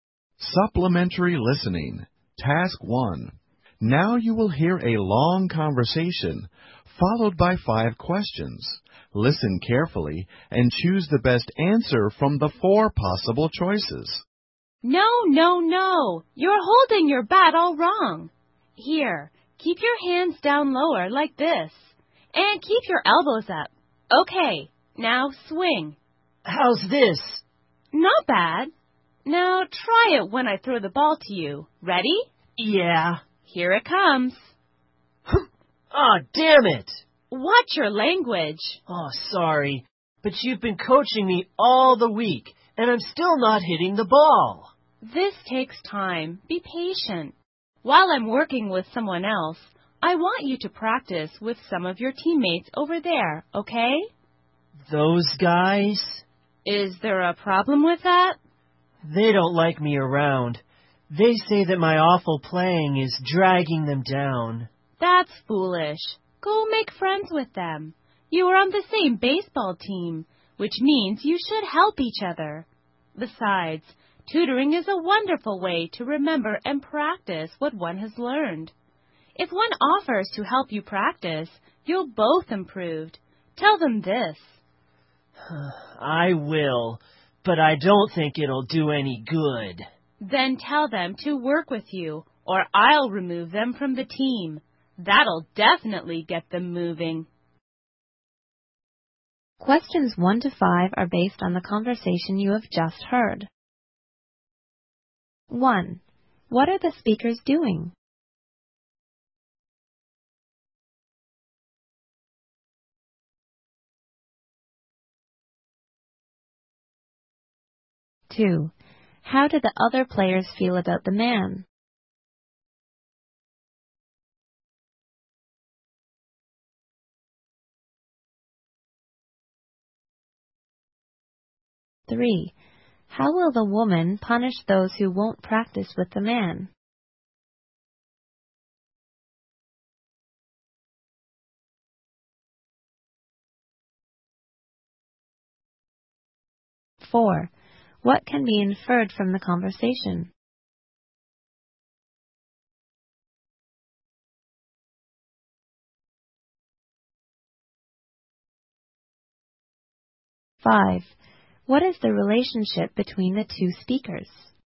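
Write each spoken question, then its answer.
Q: What are the speakers doing?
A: Baseball batting practice

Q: How did the other players feel about the man?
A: They didn't like him; his awful playing dragged them down

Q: How will the woman punish those who won't practice with the man?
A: Remove them from the team

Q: What is the relationship between the two speakers?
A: Coach and player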